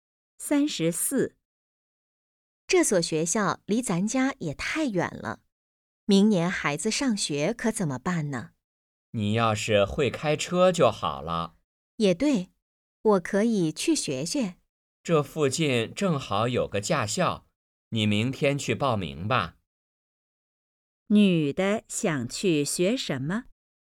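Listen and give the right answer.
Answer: 开车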